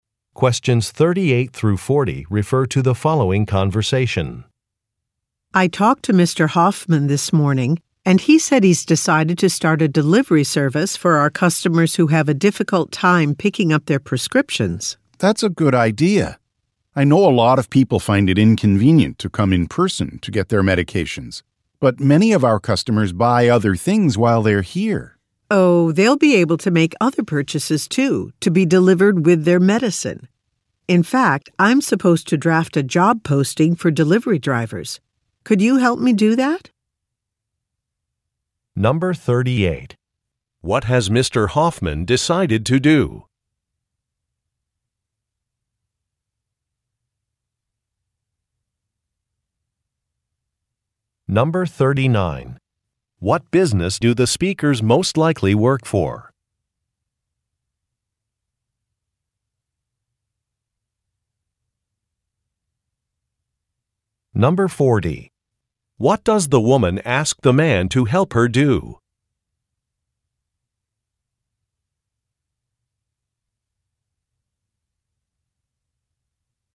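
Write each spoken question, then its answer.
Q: What has Mr. Hoffman decided to do?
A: Start a delivery service for customers

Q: What business do the speakers most likely work for?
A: A pharmacy

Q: What does the woman ask the man to help her do?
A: Draft a job posting for delivery drivers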